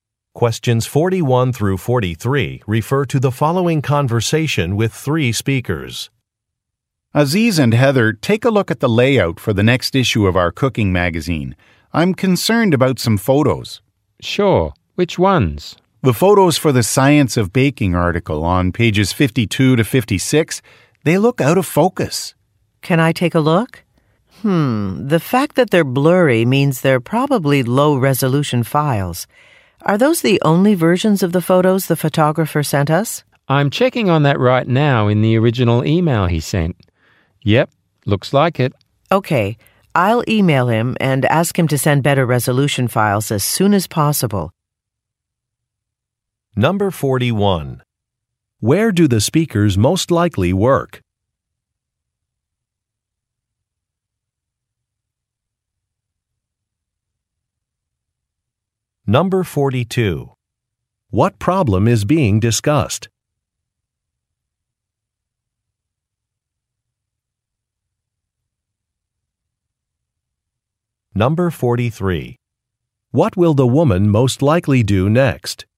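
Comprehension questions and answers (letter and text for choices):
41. Where do the speakers most likely work?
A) At a café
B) At a bookstore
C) At a magazine publisher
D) At an art gallery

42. What problem is being discussed?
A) Some images are blurry.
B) Some customers are unhappy.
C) An exhibit is incomplete.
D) An event was canceled.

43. What will the woman most likely do next?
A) Contact a photographer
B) Write an article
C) Update a Web site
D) Revise a schedule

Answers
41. C) At a magazine publisher
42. A) Some images are blurry.
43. A) Contact a photographer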